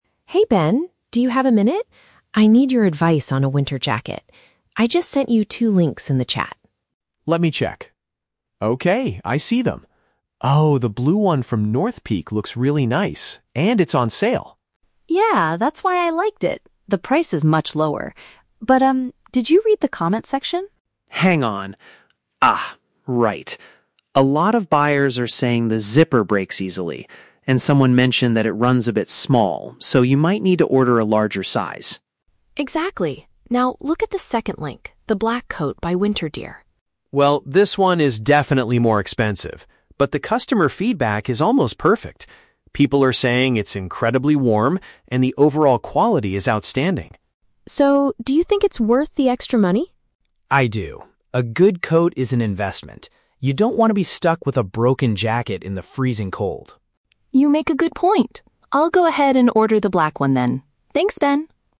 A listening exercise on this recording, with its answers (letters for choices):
Listen to a conversation between two friends about online shopping and choose the best answer (A, B, or C) for each question.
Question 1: Why is Maya hesitant to buy the blue NorthPeak jacket?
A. It is currently out of stock in her preferred size.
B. Previous purchasers reported issues with its fastener.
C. It costs much more than she originally planned to spend.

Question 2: What is the main advantage of the WinterGear coat according to the reviews?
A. It provides excellent protection against the cold.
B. It comes with a special discount for first-time buyers.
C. It features a highly fashionable and modern design.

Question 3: What is the final conclusion of their conversation?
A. Maya will buy the blue jacket but in a bigger size than usual.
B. Maya will wait for the black coat to go on sale next week.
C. Maya will purchase the pricier option because of its reliability.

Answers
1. B
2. A
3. C

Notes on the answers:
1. Ben points out that buyers are saying the "zipper breaks easily." Option B paraphrases this as "issues with its fastener."
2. Ben reads the reviews for the WinterGear coat and says people find it "incredibly warm." Option A paraphrases this as providing "excellent protection against the cold."
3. Maya decides to "order the black one" because it is an "investment" and she doesn't want a broken jacket in the cold. Option C uses synonyms: "pricier option" (more expensive black coat) and "reliability" (quality is outstanding/not breaking).

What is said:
Maya: Hey Ben, do you have a minute? I need your advice on a winter jacket. I just sent you two links in the chat.
Ben: Let me check... Okay, I see them. Oh, the blue one from NorthPeak looks really nice, and it's on sale.
Maya: Yeah, that's why I liked it. The price is much lower. But, um, did you read the comments section?
Ben: Hang on. Ah, right. A lot of buyers are saying the zipper breaks easily. And someone mentioned that it runs a bit small, so you might need to order a larger size.
Maya: Exactly. Now, look at the second link, the black coat by WinterGear.
Ben: Well, this one is definitely more expensive. But the customer feedback is almost perfect. People are saying it's incredibly warm and the overall quality is outstanding.
Maya: So, do you think it's worth the extra money?
Ben: I do. A good coat is an investment. You don't want to be stuck with a broken jacket in the freezing cold.
Maya: You make a good point. I'll go ahead and order the black one then. Thanks, Ben!